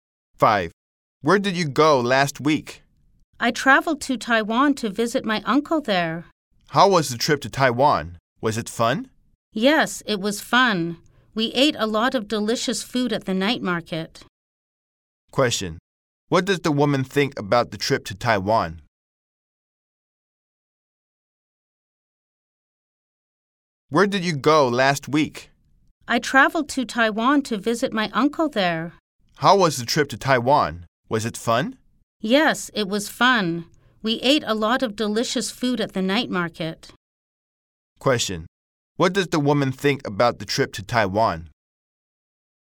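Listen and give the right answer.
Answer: It was fun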